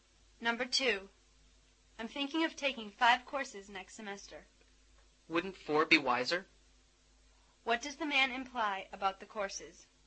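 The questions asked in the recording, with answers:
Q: What does the man imply about the courses?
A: Five courses are too many; four would be wiser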